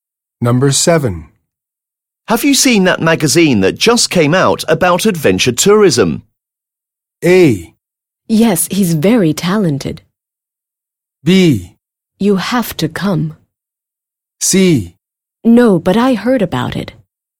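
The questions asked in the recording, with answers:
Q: Have you seen that magazine that just came out about adventure tourism?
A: C: No, but I heard about it.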